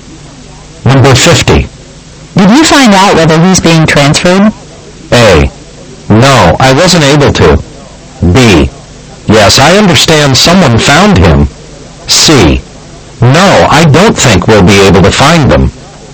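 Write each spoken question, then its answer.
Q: Did you find out whether he's being transferred?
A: A: No, I wasn't able to.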